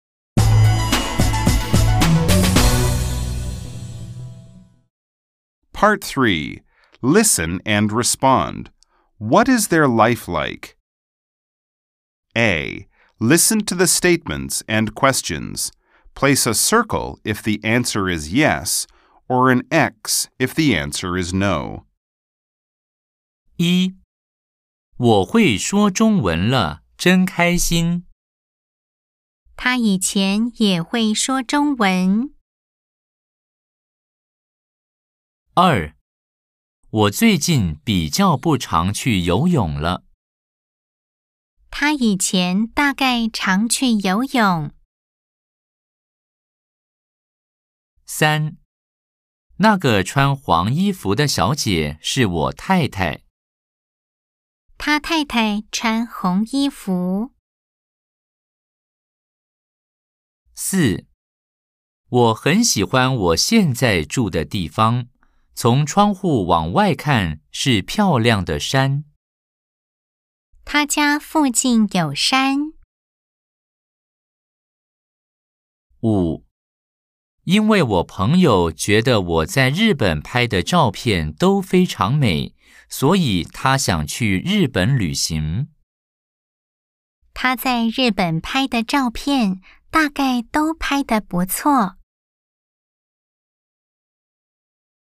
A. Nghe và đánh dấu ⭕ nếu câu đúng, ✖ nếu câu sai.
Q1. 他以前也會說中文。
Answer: O

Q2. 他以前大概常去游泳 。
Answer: O

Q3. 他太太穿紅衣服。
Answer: X

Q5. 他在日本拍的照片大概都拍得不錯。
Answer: O

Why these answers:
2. 我最近比較不常去游泳了。
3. 那個穿黃衣服的小姐是我太太。
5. 因為我朋友覺得我在日本拍的照片都非常美,所以他想去日本旅行。